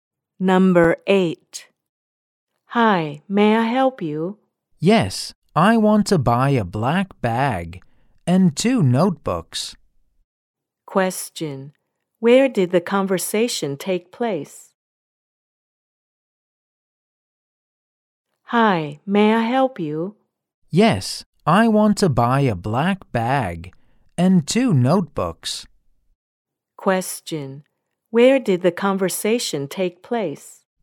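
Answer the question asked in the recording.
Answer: In a shop.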